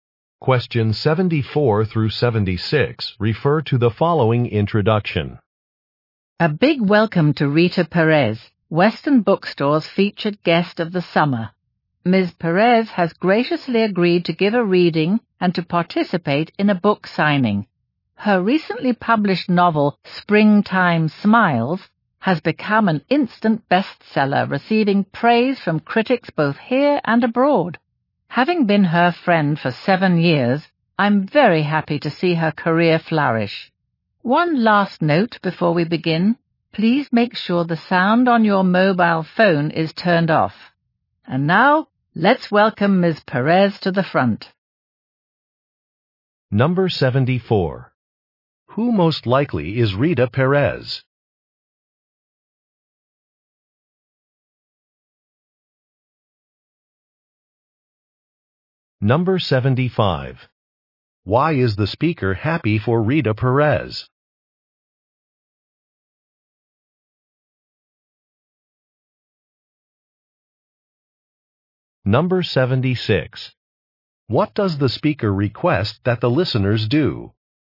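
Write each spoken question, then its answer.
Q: Who most likely is Rita Perez?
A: A novelist

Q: Why is the speaker happy for Rita Perez?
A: They have been friends for 7 years and her career is flourishing

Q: What does the speaker request that the listeners do?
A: Turn off the sound on their mobile phones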